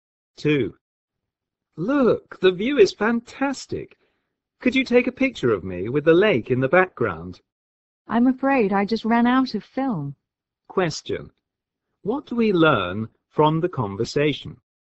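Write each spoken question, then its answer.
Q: What do we learn from the conversation?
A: The man can't take the picture because he has run out of film.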